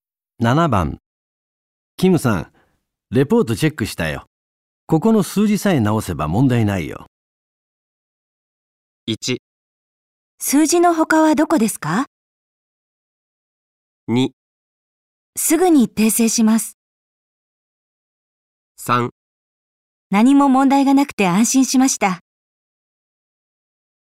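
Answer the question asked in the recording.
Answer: 2: すぐに訂正します。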